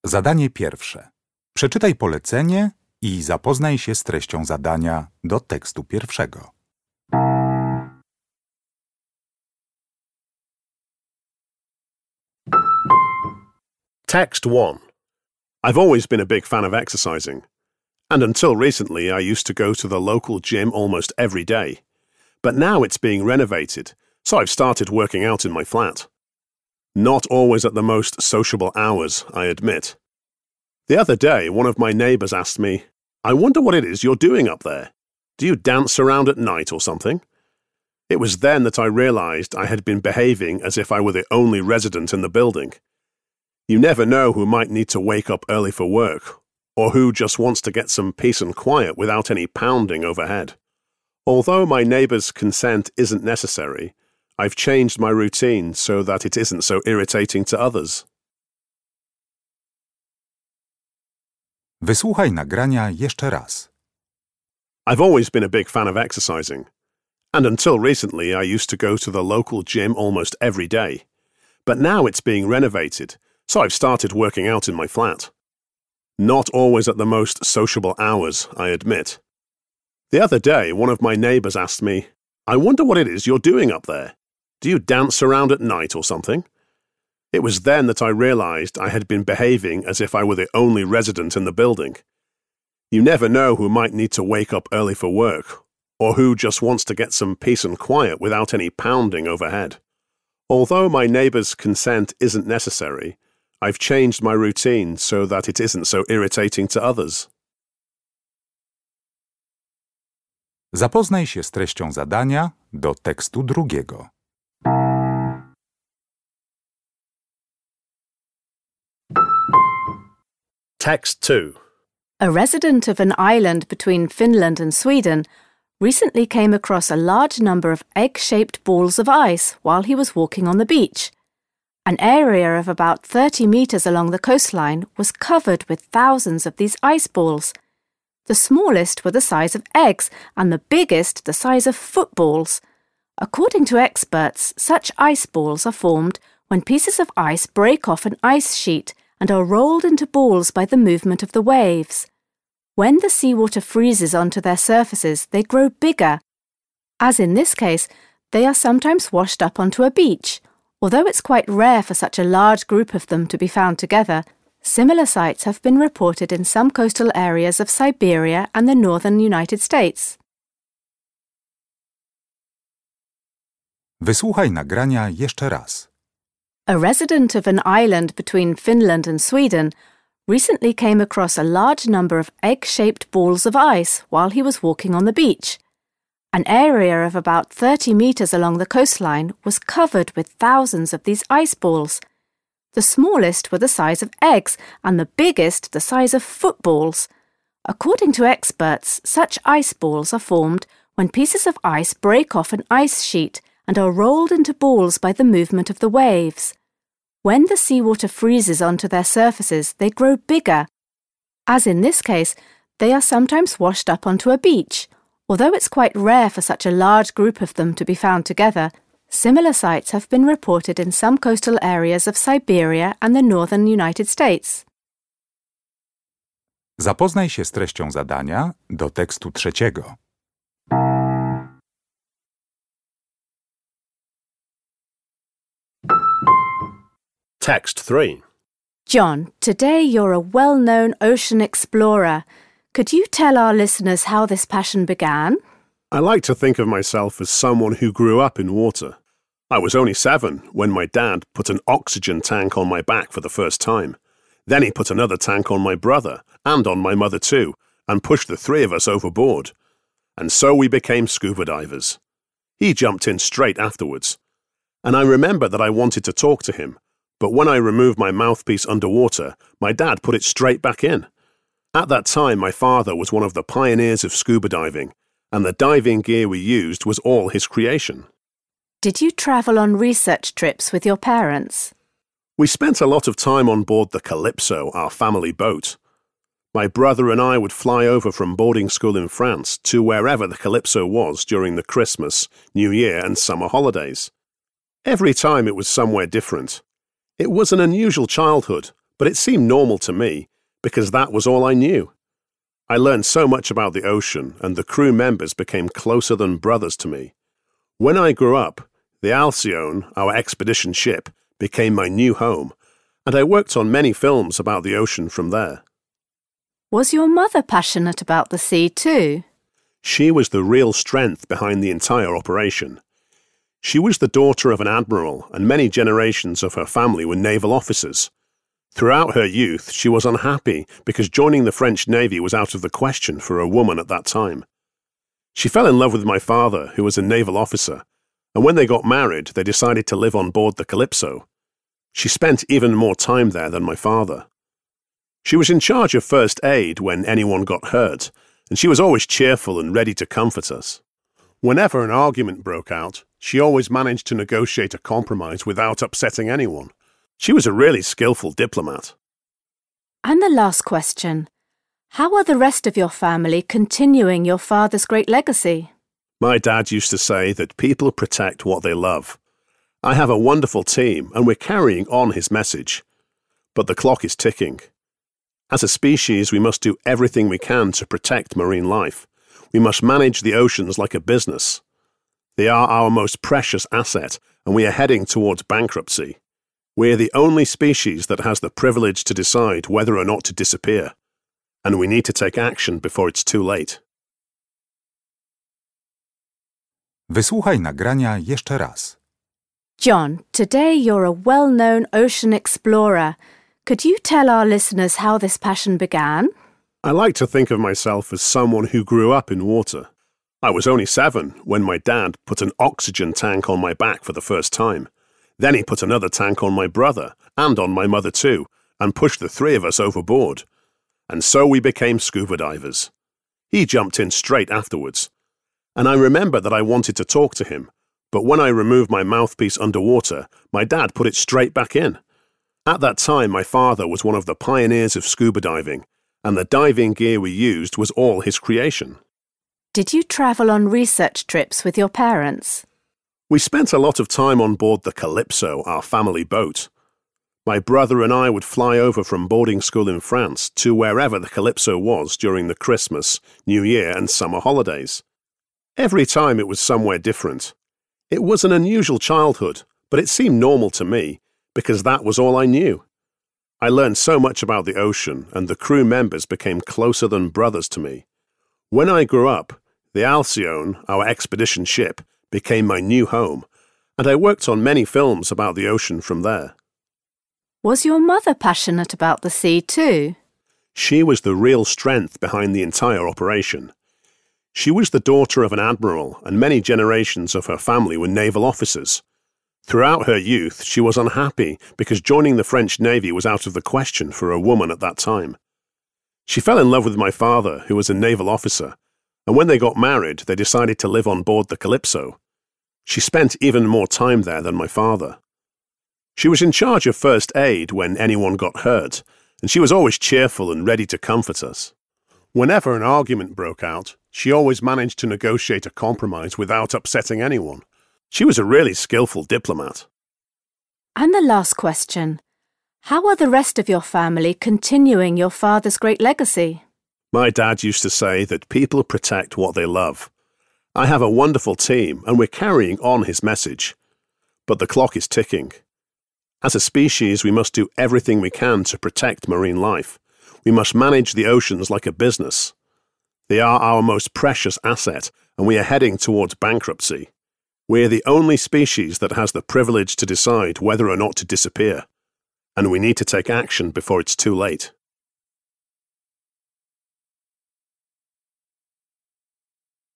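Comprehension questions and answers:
Uruchamiając odtwarzacz z oryginalnym nagraniem CKE usłyszysz dwukrotnie trzy teksty. Z podanych odpowiedzi wybierz właściwą, zgodną z treścią nagrania.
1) From what the speaker says we can conclude that he believes that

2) Which is the best headline for the news item?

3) When the speaker went scuba diving for the first time, he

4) When talking about his childhood, the speaker says that he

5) Which is NOT true about the speaker's mother?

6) When answering the last question, the speaker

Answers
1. he should be considerate towards his neighbours when exercising at home
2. Thousands of ice balls wash up on a beach
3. used diving gear designed by his father
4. considered his unusual childhood normal
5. she served in the French Navy
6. stresses the urgent need to protect the oceans

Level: poziom rozszerzony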